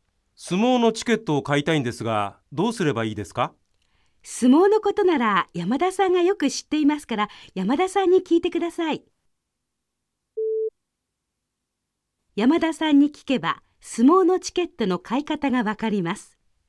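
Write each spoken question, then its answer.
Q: 山田さんに聞けば相撲のチケットの買い方がわかります。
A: ○(正しい)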